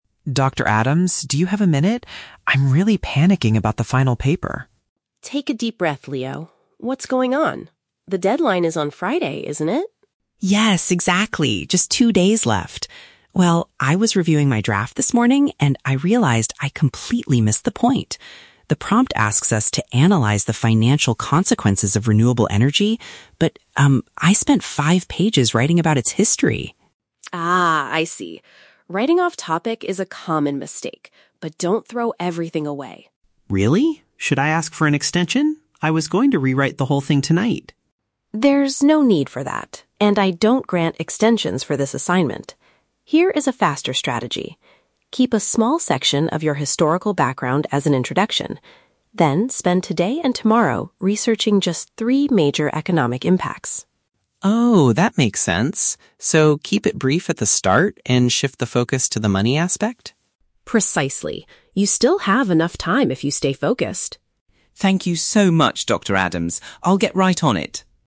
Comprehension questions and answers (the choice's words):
Listen to the conversation between a student and a lecturer, and choose the correct answer (A, B, or C) for each question.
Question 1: What is Leo's main problem with his assignment?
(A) He lost all his research data on his computer.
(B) He focused his writing on the wrong aspect of the topic.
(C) He needs extra time to finish his historical background.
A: He focused his writing on the wrong aspect of the topic.

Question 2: What did Leo originally intend to do to fix his mistake tonight?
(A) Start the entire project over from the beginning.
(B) Request a later deadline from the university.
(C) Delete his introduction and write a new one.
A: Start the entire project over from the beginning.

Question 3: What does Dr. Adams advise Leo to do now?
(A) Focus entirely on the monetary effects of the subject.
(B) Throw away his current draft and write faster.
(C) Ask the university library for more history books.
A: Focus entirely on the monetary effects of the subject.

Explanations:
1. Leo says he "completely missed the point" and wrote about "history" instead of "financial consequences". Option B perfectly paraphrases this idea. Option A is a plausible problem for a student, but it is not mentioned. Option C is a trap; an extension (extra time) is mentioned, but he does not want to finish the historical background, because that is the mistake he made.
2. Leo states, "I was going to rewrite the whole thing tonight." Option A paraphrases "rewrite the whole thing" as "start the entire project over". Option B is a trap; he asks about an extension, but the professor rejects it, and it wasn't his original plan for tonight. Option C is a trap; the professor actually tells him to keep his history part as an introduction.
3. Dr. Adams tells him to research "economic impacts" and Leo confirms he should focus on the "money aspect". Option A paraphrases this perfectly as "monetary effects". Option B is a trap because the professor explicitly says, "don't throw everything away." Option C is not mentioned in the audio.

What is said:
Leo: Dr. Adams, do you have a minute? I'm really panicking about the final paper.
Dr. Adams: Take a deep breath, Leo. What's going on? The deadline is on Friday, isn't it?
Leo: Yes, exactly! Just two days left. Well, I was reviewing my draft this morning, and I realized I completely missed the point. The prompt asks us to analyze the financial consequences of renewable energy, but... I spent five pages writing about its history!
Dr. Adams: Ah, I see. Writing off-topic is a common mistake. But don't throw everything away.
Leo: Really? Should I ask for an extension? I was going to rewrite the whole thing tonight.
Dr. Adams: There's no need for that, and I don't grant extensions for this assignment. Here is a faster strategy. Keep a small section of your historical background as an introduction. Then, spend today and tomorrow researching just three major economic impacts.
Leo: Oh, that makes sense. So, keep it brief at the start, and shift the focus to the money aspect?
Dr. Adams: Precisely. You still have enough time if you stay focused.